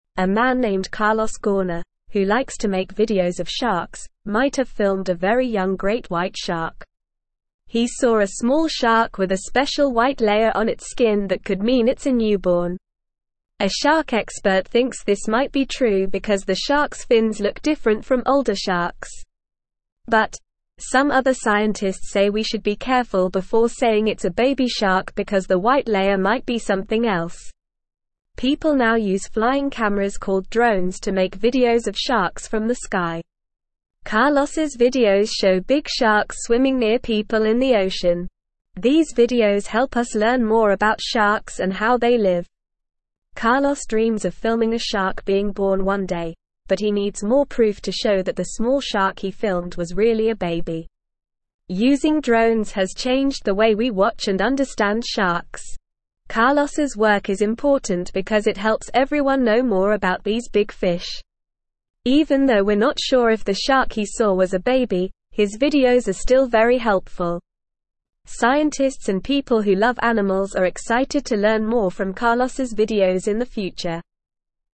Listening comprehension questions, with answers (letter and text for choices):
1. What is the name of the man who likes to make videos of sharks?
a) Carlos Santos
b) Carlos Hernandez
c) Carlos Rodriguez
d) Carlos Gauna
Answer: d) Carlos Gauna

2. What did Carlos see on the skin of the small shark?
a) A black spot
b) A blue stripe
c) A green pattern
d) A special white layer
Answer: d) A special white layer

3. Why do some scientists think the small shark might be a baby?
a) Because it has a special white layer on its skin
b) Because it was swimming near people in the ocean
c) Because its fins look different from older sharks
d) Because it was filmed by a drone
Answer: c) Because its fins look different from older sharks

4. What are flying cameras called that people use to film sharks from the sky?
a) Drones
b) Helicopters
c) Airplanes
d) Balloons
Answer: a) Drones

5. What do Carlos's videos help us learn more about?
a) Sharks and how they live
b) Birds and their nests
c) Dolphins and their tricks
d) Turtles and their shells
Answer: a) Sharks and how they live

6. What does Carlos dream of filming one day?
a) A whale jumping out of the water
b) A dolphin swimming with a person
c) A shark being born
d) A turtle laying eggs on the beach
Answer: c) A shark being born

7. Why is Carlos's work important?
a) It helps everyone know more about birds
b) It helps everyone know more about sharks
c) It helps everyone know more about dolphins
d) It helps everyone know more about turtles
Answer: b) It helps everyone know more about sharks

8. Who is excited to learn more from Carlos's videos in the future?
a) Astronauts and people who love space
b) Scientists and people who love animals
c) Chefs and people who love cooking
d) Teachers and people who love books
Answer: b) Scientists and people who love animals

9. He saw a small shark with a special white layer on its (2)______ that could mean it's a newborn.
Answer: skin

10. A shark expert thinks this might be (3)______ because the shark's fins look different from older sharks.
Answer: true

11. People now use flying (4)______ called (5)______ to make (6)______ of sharks from the sky.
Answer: cameras

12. People now use flying (4)______ called (5)______ to make (6)______ of sharks from the sky.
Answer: drones

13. People now use flying (4)______ called (5)______ to make (6)______ of sharks from the sky.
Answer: videos

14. These videos (7)______ us learn more about sharks and how they live.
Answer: help

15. Carlos dreams of filming a shark being (8)______ one day, but he needs more proof to show that the small shark he filmed was really a baby.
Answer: born

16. Using drones has (9)______ the way we watch and understand sharks.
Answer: changed

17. Even though we're not sure if the shark he saw was a baby, his videos are still very (10)______.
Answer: helpful

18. (11)______ and (12)______ who love animals are excited to learn more from Carlos's videos in the future.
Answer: Scientists

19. (11)______ and (12)______ who love animals are excited to learn more from Carlos's videos in the future.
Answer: people

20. The small shark he saw had a special white layer on its skin.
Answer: True

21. Carlos's videos show big sharks swimming near people in the ocean.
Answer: True

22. The white layer on the shark's skin could mean it's an adult.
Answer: False

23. People now use flying cameras called drones to film whales from the sky.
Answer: False

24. Carlos may have filmed a very old great white shark.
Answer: False

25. Some scientists are confident about calling it a baby shark because the white layer might be something else.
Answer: False

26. Carlos's work with drones has changed the way we learn about and understand sharks.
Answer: True

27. Carlos Gauna enjoys making videos of sharks.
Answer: True

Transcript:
A man named Carlos Gauna, who likes to make videos of sharks, might have filmed a very young great white shark. He saw a small shark with a special white layer on its skin that could mean it's a newborn. A shark expert thinks this might be true because the shark's fins look different from older sharks. But, some other scientists say we should be careful before saying it's a baby shark because the white layer might be something else.
People now use flying cameras called drones to make videos of sharks from the sky. These videos help us learn more about sharks and how they live. Carlos dreams of filming a shark being born one day, but he needs more proof to show that the small shark he filmed was really a baby.
Using drones has changed the way we watch and understand sharks. Carlos's work is important because it helps everyone know more about these big fish. Even though we're not sure if the shark he saw was a baby, his videos are still very helpful. Scientists and people who love animals are excited to learn more from Carlos's videos in the future.

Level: Level 2